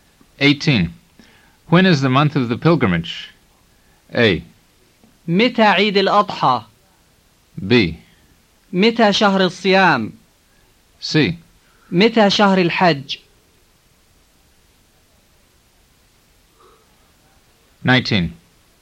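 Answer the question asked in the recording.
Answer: C: متى شهر الحج؟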